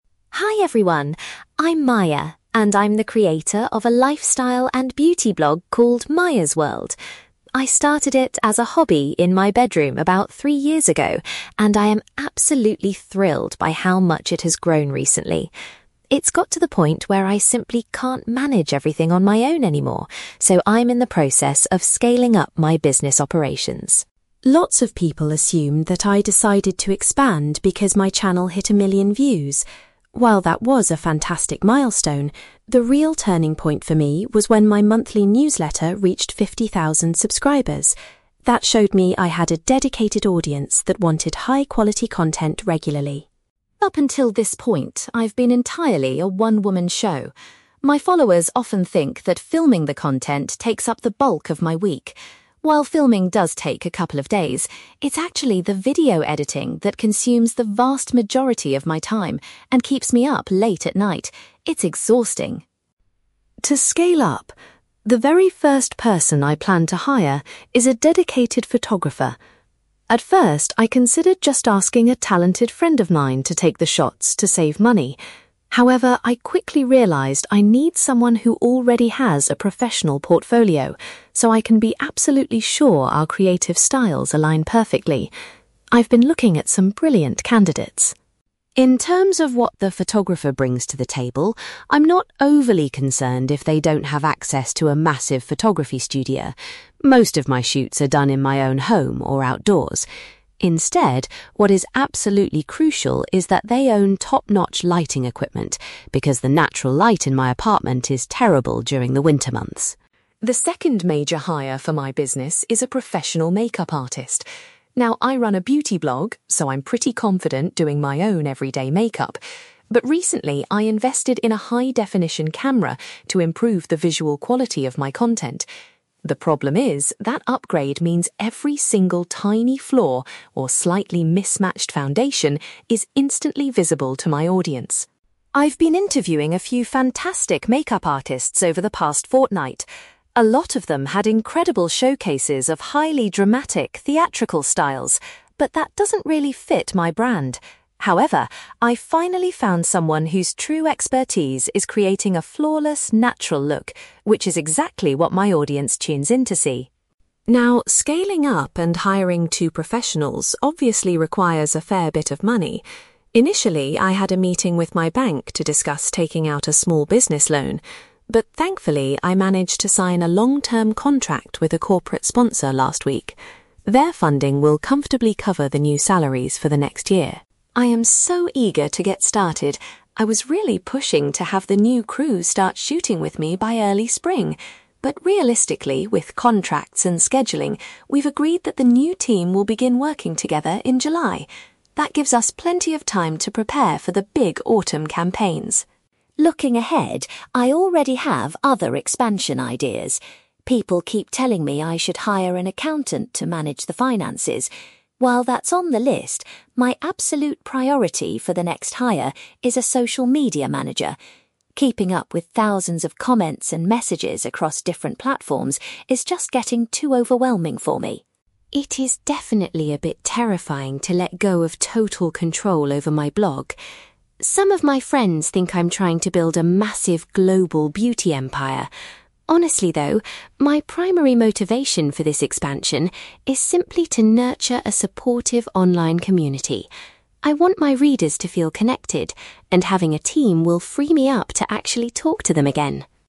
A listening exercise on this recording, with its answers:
For questions 9-18, complete the sentences with a word or short phrase.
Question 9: Maya realised it was time to expand her business when her (9)........................... gained 50,000 subscribers.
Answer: monthly newsletter

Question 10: Maya explains that she spends a large proportion of her time on (10)........................... .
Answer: video editing

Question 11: When choosing a photographer, Maya is looking for someone with a professional (11)........................... .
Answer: portfolio

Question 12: Maya says it is essential for her new photographer to possess good (12)........................... .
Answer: lighting equipment

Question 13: Maya decided she needed a makeup artist after she started using a (13)........................... for her posts.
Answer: high-definition camera

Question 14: Maya wants to hire a makeup artist who is skilled at creating a (14)........................... .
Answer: natural look

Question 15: Maya is funding her business expansion with the help of a (15)........................... .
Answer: corporate sponsor

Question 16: Maya's new team will officially begin their work together in (16)........................... .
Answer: July

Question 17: Maya reveals that her next step will be to employ a (17)........................... .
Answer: social media manager

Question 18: Maya's ultimate goal for her blog's expansion is to develop a better (18)........................... .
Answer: online community

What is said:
Maya: Hi everyone! I'm Maya, and I'm the creator of a lifestyle and beauty blog called Maya's World. I started it as a hobby in my bedroom about three years ago, and I am absolutely thrilled by how much it has grown recently. It's got to the point where I simply can't manage everything on my own anymore, so I'm in the process of scaling up my business operations.
Lots of people assume that I decided to expand because my channel hit a million views. While that was a fantastic milestone, the real turning point for me was when my monthly newsletter reached fifty thousand subscribers. That showed me I had a dedicated audience that wanted high-quality content regularly.
Up until this point, I've been entirely a one-woman show. My followers often think that filming the content takes up the bulk of my week. While filming does take a couple of days, it's actually the video editing that consumes the vast majority of my time and keeps me up late at night. It's exhausting!
To scale up, the very first person I plan to hire is a dedicated photographer. At first, I considered just asking a talented friend of mine to take the shots to save money. However, I quickly realised I need someone who already has a professional portfolio, so I can be absolutely sure our creative styles align perfectly. I've been looking at some brilliant candidates.
In terms of what the photographer brings to the table, I'm not overly concerned if they don't have access to a massive photography studio. Most of my shoots are done in my own home or outdoors. Instead, what is absolutely crucial is that they own top-notch lighting equipment, because the natural light in my apartment is terrible during the winter months.
The second major hire for my business is a professional makeup artist. Now, I run a beauty blog, so I'm pretty confident doing my own everyday makeup. But recently, I invested in a high-definition camera to improve the visual quality of my content. The problem is, that upgrade means every single tiny flaw or slightly mismatched foundation is instantly visible to my audience!
I've been interviewing a few fantastic makeup artists over the past fortnight. A lot of them had incredible showcases of highly dramatic, theatrical styles. But that doesn't really fit my brand. However, I finally found someone whose true expertise is creating a flawless natural look, which is exactly what my audience tunes in to see.
Now, scaling up and hiring two professionals obviously requires a fair bit of money. Initially, I had a meeting with my bank to discuss taking out a small business loan. But thankfully, I managed to sign a long-term contract with a corporate sponsor last week. Their funding will comfortably cover the new salaries for the next year.
I am so eager to get started. I was really pushing to have the new crew start shooting with me by early spring. But realistically, with contracts and scheduling, we've agreed that the new team will begin working together in July. That gives us plenty of time to prepare for the big autumn campaigns.
Looking ahead, I already have other expansion ideas. People keep telling me I should hire an accountant to manage the finances. While that's on the list, my absolute priority for the next hire is a social media manager. Keeping up with thousands of comments and messages across different platforms is just getting too overwhelming for me.
It is definitely a bit terrifying to let go of total control over my blog. Some of my friends think I'm trying to build a massive global beauty empire. Honestly, though, my primary motivation for this expansion is simply to nurture a supportive online community. I want my readers to feel connected, and having a team will free me up to actually talk to them again.

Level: B2